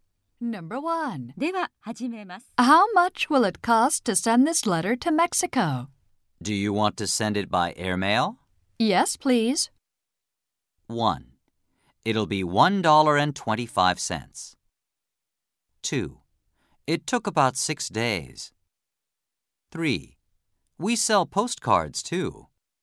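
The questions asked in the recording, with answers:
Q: Yes, please.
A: 1: It'll be $1.25.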